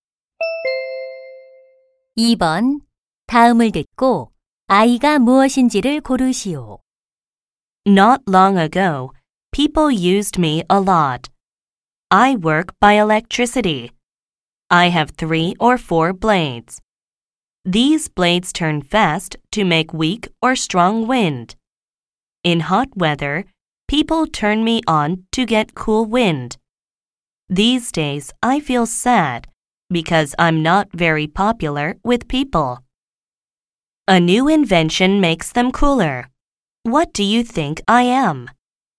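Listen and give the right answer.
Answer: 선풍기 (electric fan)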